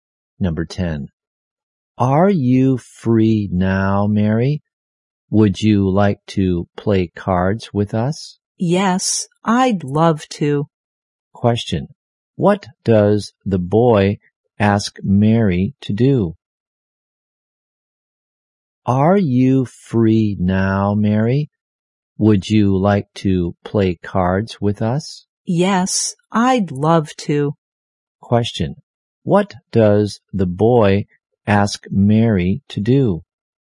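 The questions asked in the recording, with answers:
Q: What does the boy ask Mary to do?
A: To play cards with them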